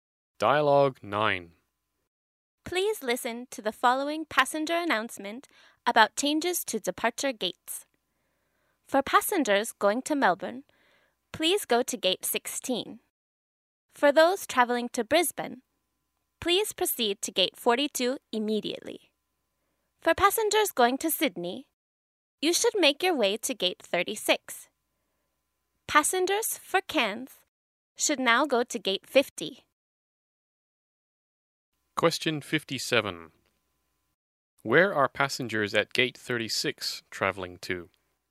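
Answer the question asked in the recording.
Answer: Sydney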